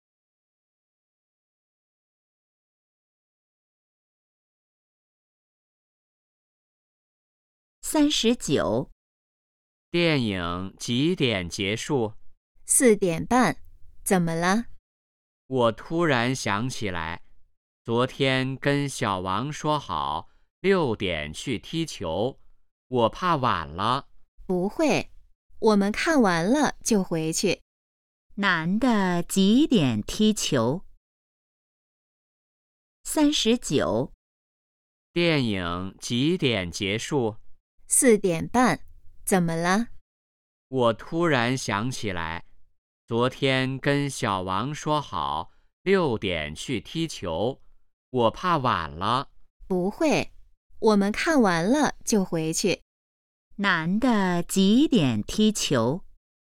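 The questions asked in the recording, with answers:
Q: 男的几点踢球?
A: 6点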